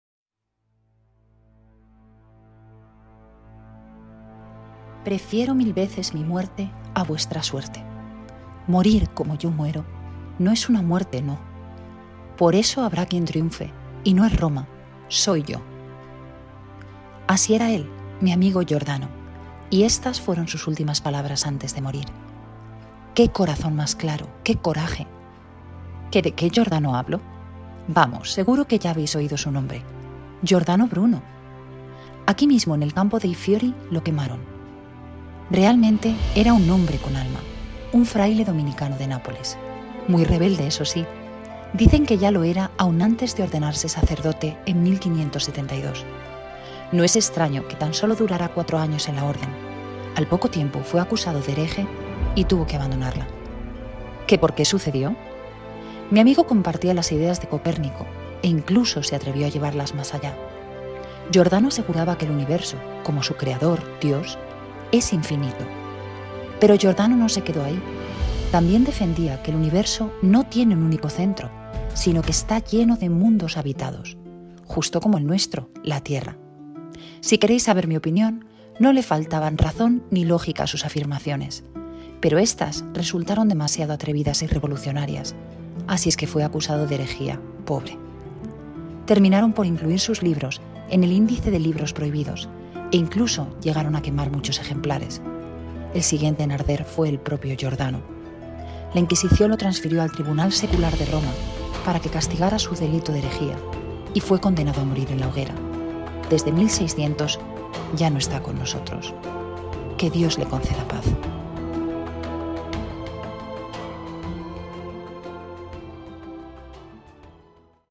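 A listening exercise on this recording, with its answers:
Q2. ¿Cuál fue la razón que dirigió a Giordano Bruno a decir que la Tierra no es inmóvil?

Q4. Antes de Bruno, ¿quién era el famoso astrónomo que declaró que la Tierra no es inmóvil?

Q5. ¿Cuándo quemaron a Giordano Bruno en esta plaza?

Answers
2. Compartía las ideas de Copérnico
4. Copérnico
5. En 1600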